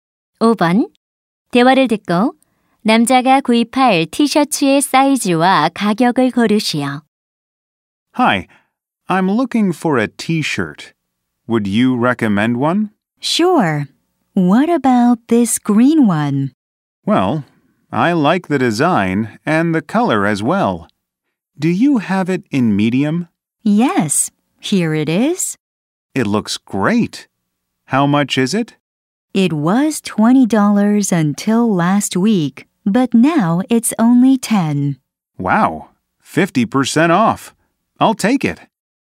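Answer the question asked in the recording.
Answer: 미디엄, 10달러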